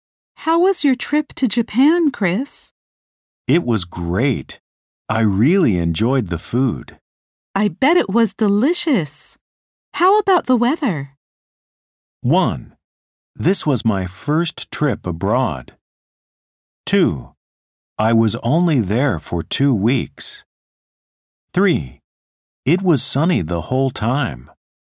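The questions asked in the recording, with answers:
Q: I bet it was delicious. How about the weather?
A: 3: It was sunny the whole time.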